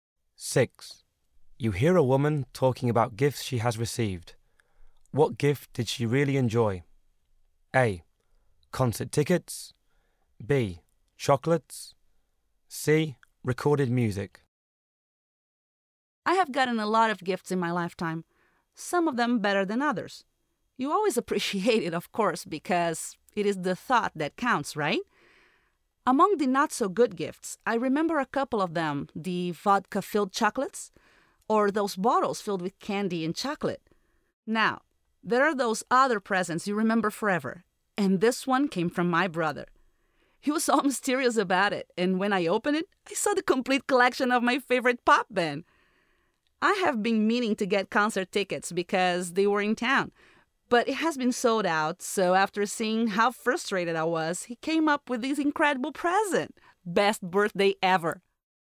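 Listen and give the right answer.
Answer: C: Recorded music.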